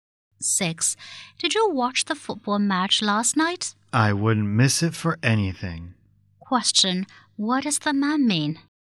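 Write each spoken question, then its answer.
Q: What does the man mean?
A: He watched the match.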